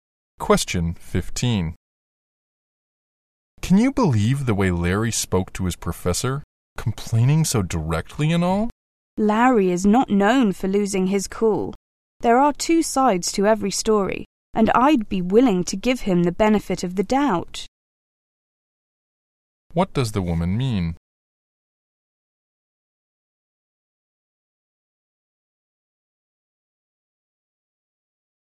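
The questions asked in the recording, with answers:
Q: What does the woman mean?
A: She won't judge Larry before hearing his side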